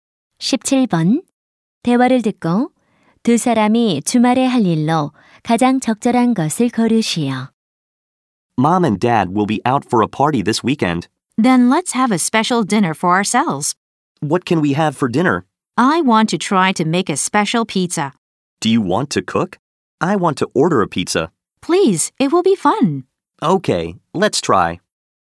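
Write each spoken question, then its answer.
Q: 대화를 듣고 두 사람이 주말에 할 일로 가장 적절한 것을 고르시오.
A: 피자 만들기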